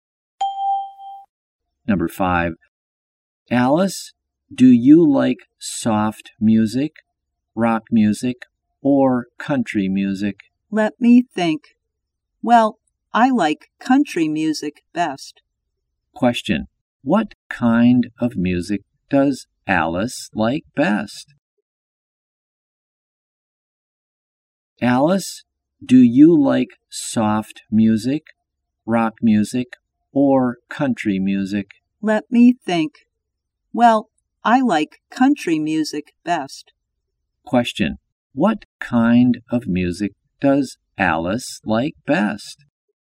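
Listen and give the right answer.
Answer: Country music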